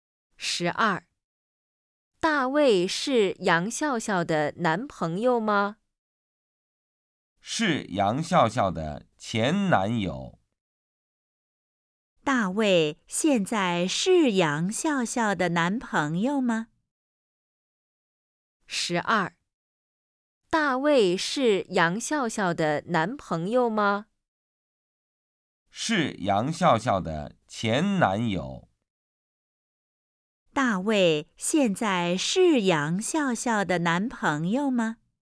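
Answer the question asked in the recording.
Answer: 不是,是前男友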